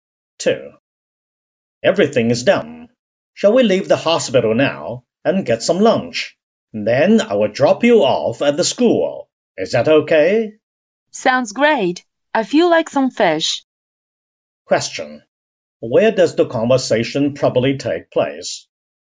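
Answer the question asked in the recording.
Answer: At a hospital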